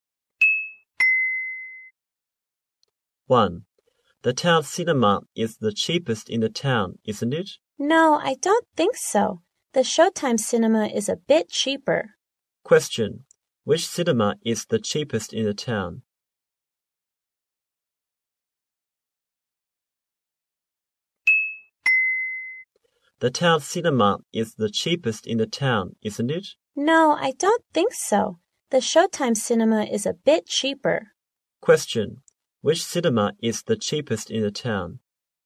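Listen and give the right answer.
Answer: The Showtime cinema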